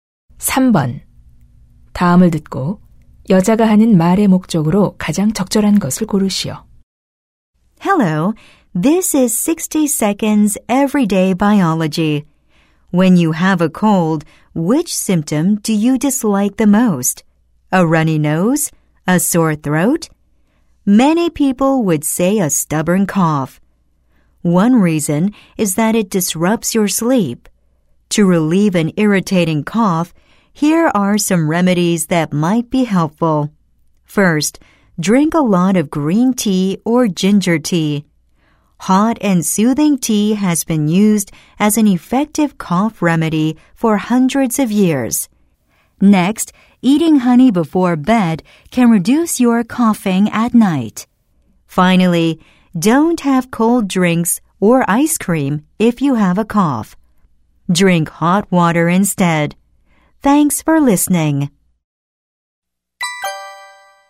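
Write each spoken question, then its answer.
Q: 다음을 듣고 여자가 하는 말의 목적으로 가장 적절한 것을 고르시오.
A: 기침 완화 방법을 소개하려고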